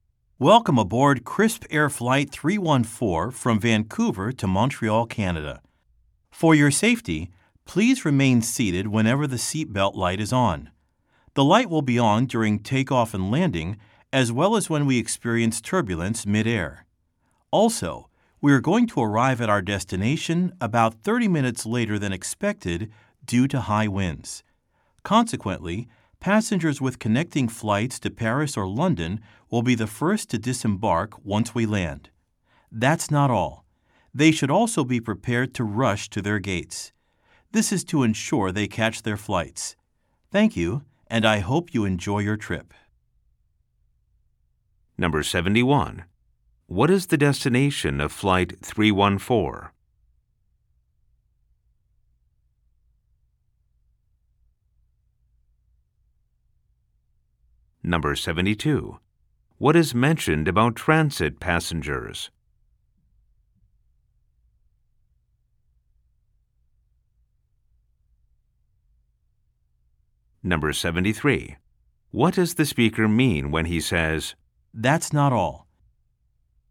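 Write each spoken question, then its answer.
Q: What is the destination of Flight 314?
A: Montreal, Canada

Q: What is mentioned about transit passengers?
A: Those connecting to Paris or London will get off first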